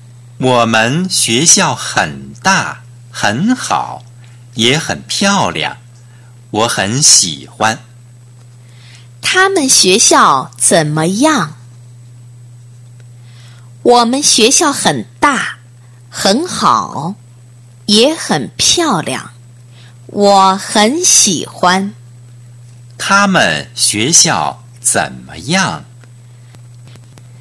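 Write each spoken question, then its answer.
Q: 他们学校怎么样?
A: 很大,很好,也很漂亮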